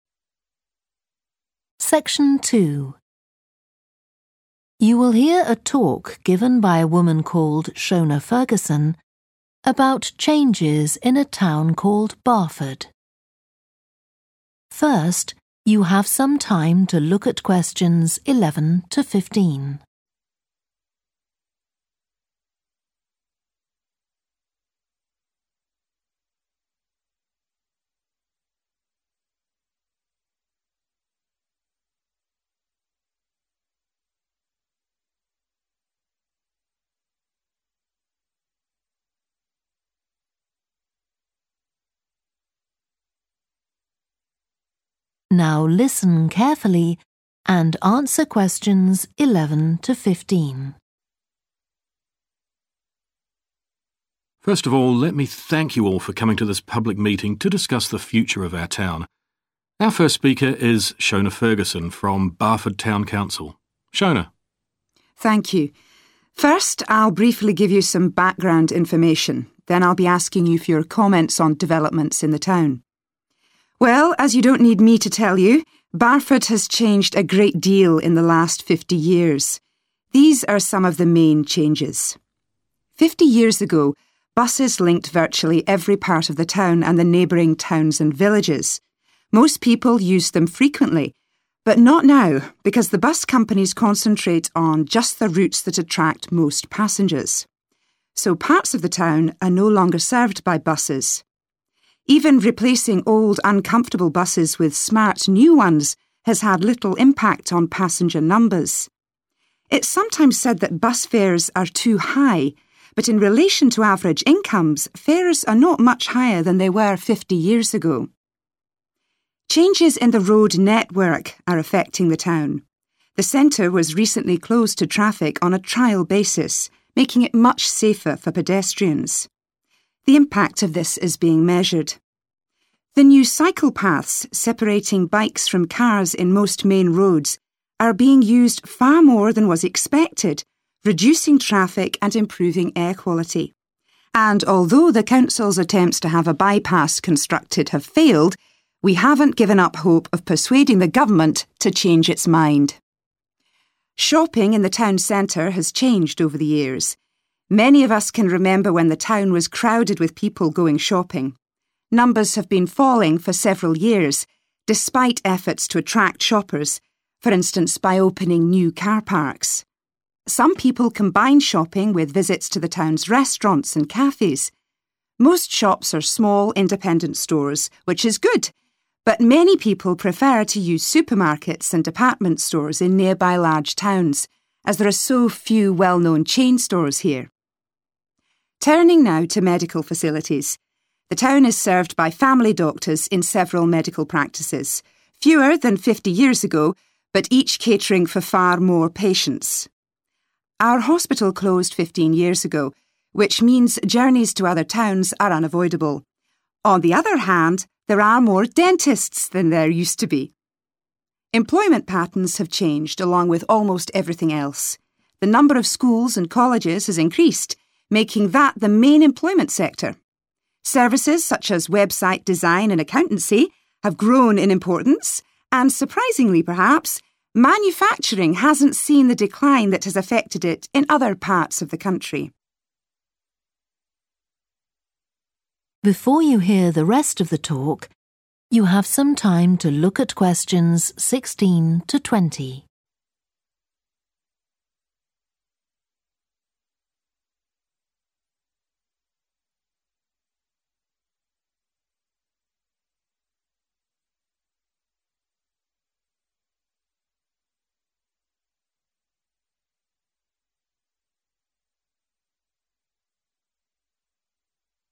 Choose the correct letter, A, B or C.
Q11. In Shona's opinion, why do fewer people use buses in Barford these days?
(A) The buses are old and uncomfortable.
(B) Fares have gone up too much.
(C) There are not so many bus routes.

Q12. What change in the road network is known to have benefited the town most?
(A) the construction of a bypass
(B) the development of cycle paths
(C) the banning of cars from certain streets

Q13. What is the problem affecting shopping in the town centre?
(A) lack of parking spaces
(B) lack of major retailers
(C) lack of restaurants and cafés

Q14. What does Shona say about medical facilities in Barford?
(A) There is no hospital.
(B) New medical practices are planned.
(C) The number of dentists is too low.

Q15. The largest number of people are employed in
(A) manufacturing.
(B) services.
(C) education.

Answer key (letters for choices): 11C, 12B, 13B, 14A, 15C

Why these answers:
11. The correct answer is 'C' (There are not so many bus routes) because the excerpt explicitly mentions that certain areas of the town are no longer served by buses due to bus companies prioritizing popular routes. This reduction in bus routes directly supports the statement that fewer people use buses in Barford.
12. The correct answer is 'the development of cycle paths' because the excerpt specifically mentions that the new cycle paths are reducing traffic and improving air quality. This directly shows that the development of cycle paths has benefited the town the most out of the given options.
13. The correct answer is 'B' because the excerpt specifically mentions that people prefer to shop in larger towns due to the absence of well-known chain stores in Barford, indicating a lack of major retailers in the town center.
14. The correct answer is A because Shona mentions that the hospital in Barford closed 15 years ago, which aligns with the statement that there is no hospital in Barford currently.
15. The correct answer is 'education' because the excerpt mentions that the increase in the number of schools and colleges has made education the main employment sector in Barford. This indicates that more people are employed in education compared to manufacturing or services.

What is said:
MAN: First of all, let me thank you all for coming to this public meeting, to discuss the future of our town. Our first speaker is Shona Ferguson, from Barford town council.
SHONA: Thank you. First I'll briefly give you some background information, then I'll be asking you for your comments on developments in the town.
Well, as you don't need me to tell you, Barford has changed a great deal in the last 50 years. These are some of the main changes.
Fifty years ago, buses linked virtually every part of the town and the neighbouring towns and villages. Most people used them frequently, but not now because the bus companies concentrate on just the routes that attract most passengers. So parts of the town are no longer served by buses. Even replacing old uncomfortable buses with smart new ones has had little impact on passenger numbers. It's sometimes said that bus fares are too high, but in relation to average incomes, fares are not much higher than they were 50 years ago.
Changes in the road network are affecting the town. The centre was recently closed to traffic on a trial basis, making it much safer to pedestrians. The impact of this is being measured. The new cycle paths separating bikes from cars in most main roads, are being used far more than was expected reducing traffic and improving air quality. And although the council's attempts to have a bypass constructed have failed, we haven't given up hope of persuading the government to change its mind.
Shopping in the town centre has changed over the years. Many of us can remember when the town was crowded with people going shopping. Numbers have been falling for several years, despite efforts to attract shoppers, for instance by opening new car parks. some people combine shopping with visits to the town's restaurants and cafés. Most shops are small independent stores, which is good, but many people prefer to use supermarkets and department stores in nearby large towns, as there are so few well-known chain stores here.Turning how to medical facilities, the town is served by family doctors in several medical practices – fewer than 50 years ago, but each catering for far more patients. Our hospital closed 15 years ago, which means journeys to other towns are unavoidable. On the other hand, there are more dentists than there used to be. Employment patterns have changed, along with almost everything else. The number of schools and colleges has increased making that the main employment sector. Services, such as website design and accountancy, have grown in importance, and surprisingly, perhaps, manufacturing hasn't seen the decline that has affected it in other parts of the country.